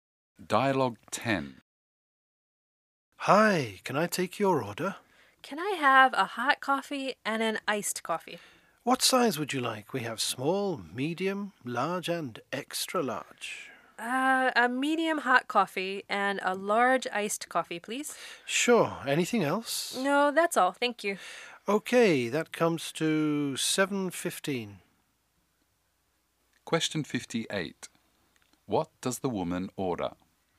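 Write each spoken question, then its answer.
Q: What does the woman order?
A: A medium hot coffee and a large iced coffee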